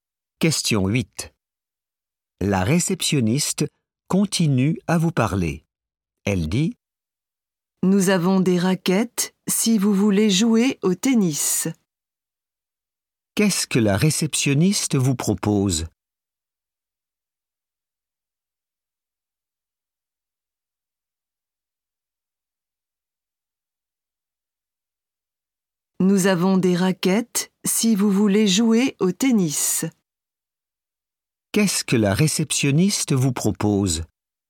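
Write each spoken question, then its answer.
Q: Qu'est-ce que la réceptionniste vous propose ?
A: des raquettes pour jouer au tennis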